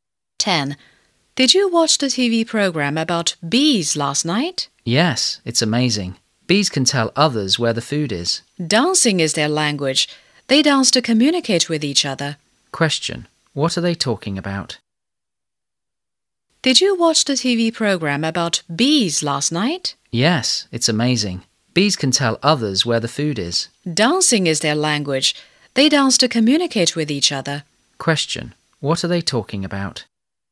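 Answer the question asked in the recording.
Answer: A TV program about bees and how they communicate by dancing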